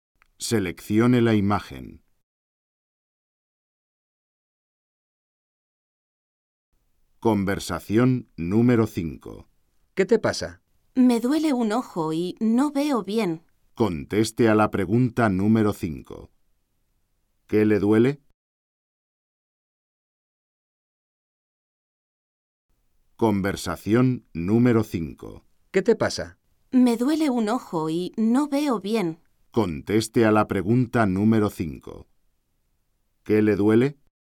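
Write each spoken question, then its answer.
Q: ¿Qué le duele?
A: Un ojo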